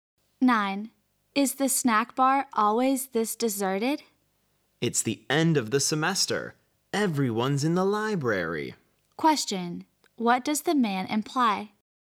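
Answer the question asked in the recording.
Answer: Students are studying in the library for the end of the semester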